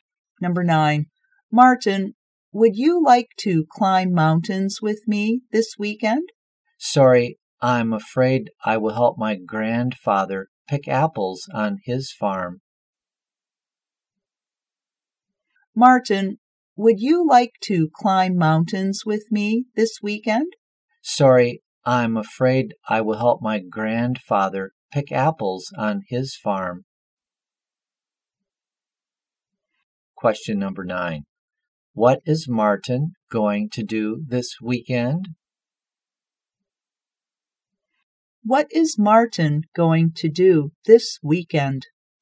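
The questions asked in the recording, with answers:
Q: What is Martin going to do this weekend?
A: Help his grandfather pick apples on his farm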